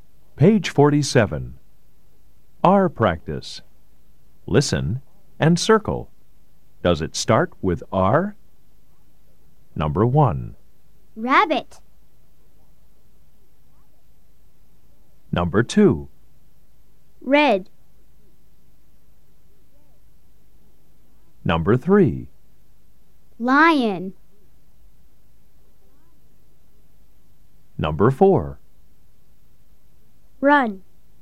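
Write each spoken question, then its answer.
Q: Does it start with R? Number 1. Rabbit.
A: Yes

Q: Lion.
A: No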